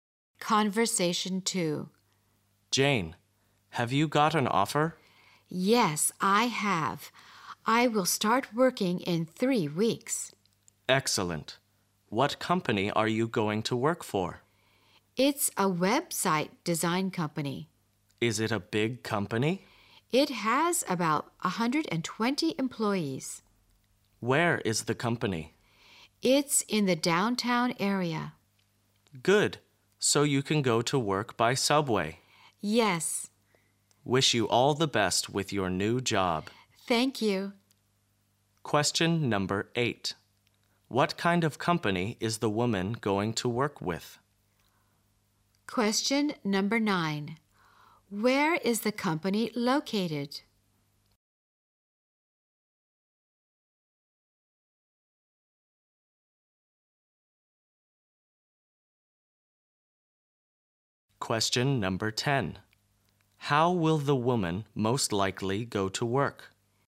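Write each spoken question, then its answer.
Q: What kind of company is the woman going to work with?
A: A website design company

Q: Where is the company located?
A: In the downtown area

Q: How will the woman most likely go to work?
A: By subway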